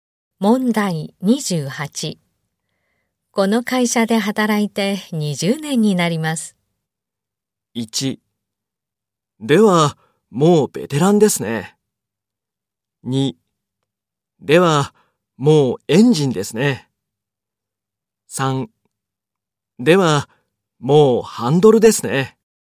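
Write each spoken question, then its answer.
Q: この会社で働いて20年になります。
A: 1: ではもうベテランですね。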